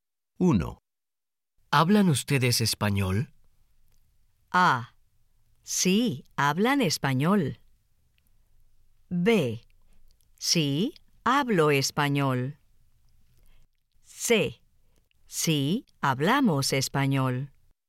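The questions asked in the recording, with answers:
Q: ¿Hablan ustedes español?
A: C: Sí, hablamos español.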